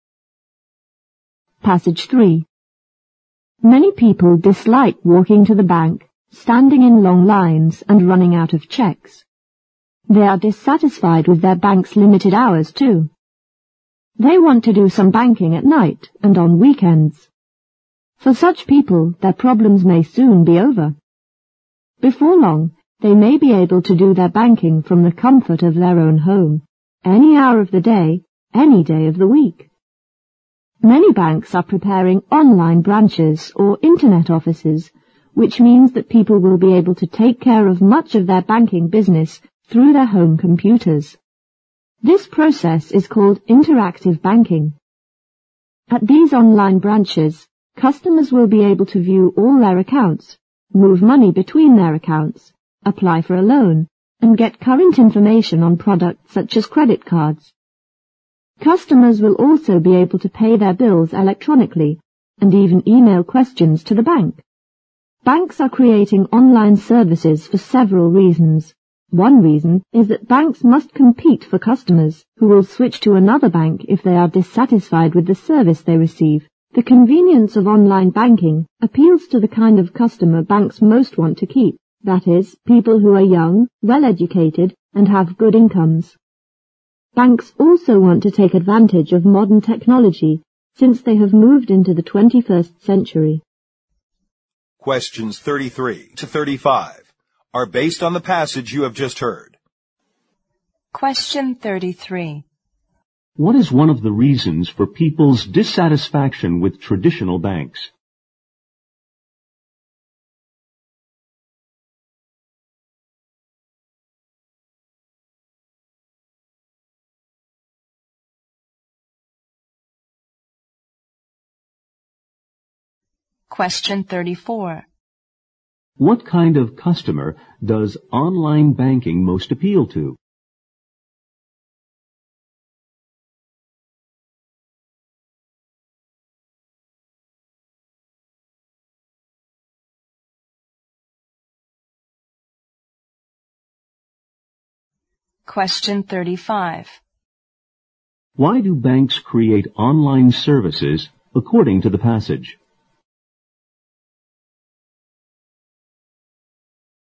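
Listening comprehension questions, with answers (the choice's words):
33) 33.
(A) Their business hours are limited.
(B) Their safety measures are inadequate.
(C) Their banking procedures are complicated.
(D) They don't have enough service windows.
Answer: Their business hours are limited.

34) 34.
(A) People who are in the habit of switching from one bank to another.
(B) Young people who are fond of modern technology.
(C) Young people who are wealthy and well-educated.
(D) People who have computers at home.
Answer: Young people who are wealthy and well-educated.

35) 35.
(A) To compete for customers.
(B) To reduce the size of their staff.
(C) To provide services for distant clients.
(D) To expand their operations at a lower cost.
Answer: To compete for customers.

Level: 六级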